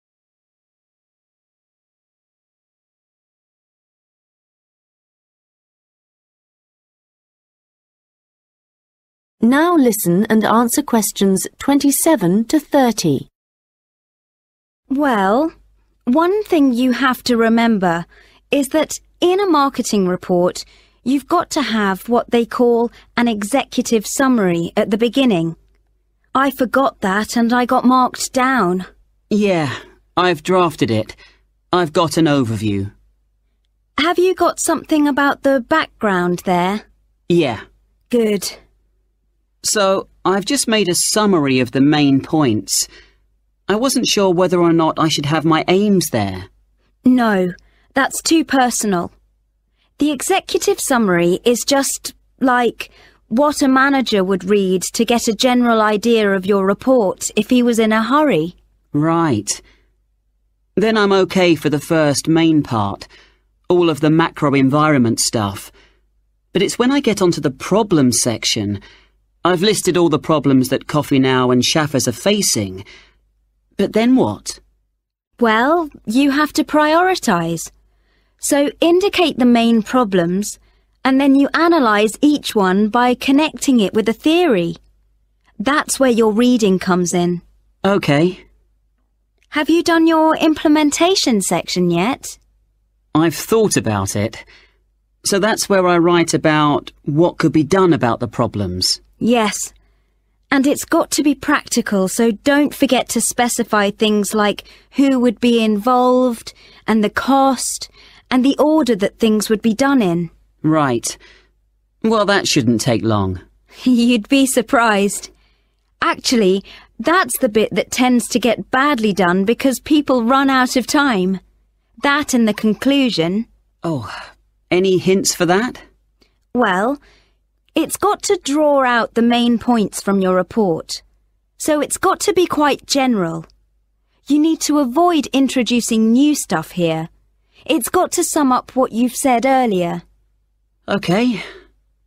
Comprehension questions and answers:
Questions 27-30 Complete the notes below. Write ONE WORD ONLY for each answer.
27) Executive summary – Give a brief overview including the 27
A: background

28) Problems – Link each problem to a 28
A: theory

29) Include details such as participants, 29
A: cost

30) Section is often poorly done because of lack of 30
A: time